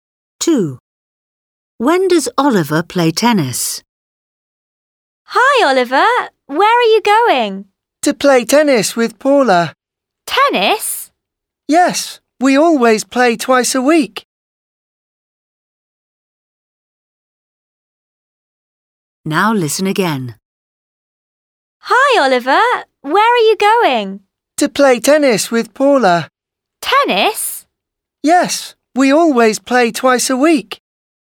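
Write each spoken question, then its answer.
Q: When does Oliver play tennis?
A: twice a week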